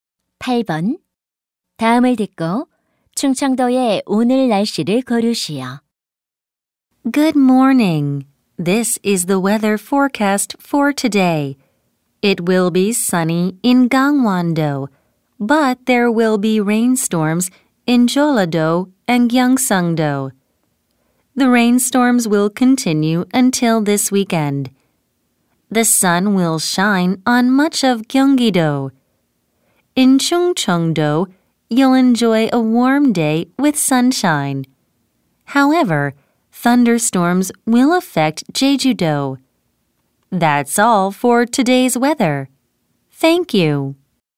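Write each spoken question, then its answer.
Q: 다음을 듣고 충청도의 오늘 날씨를 고르시오.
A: 맑고 따뜻함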